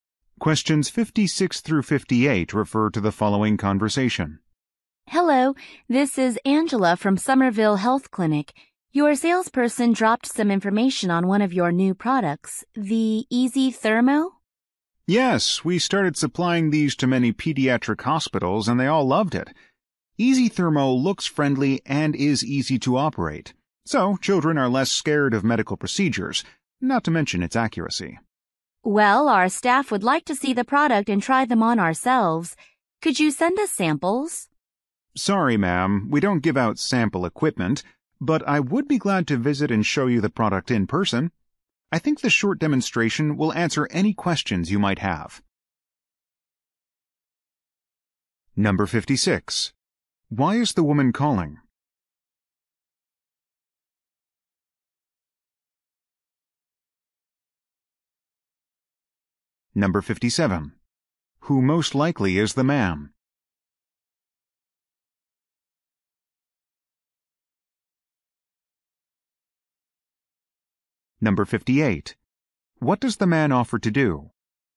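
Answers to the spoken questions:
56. To request product samples
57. A medical equipment salesperson
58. Visit and demonstrate the product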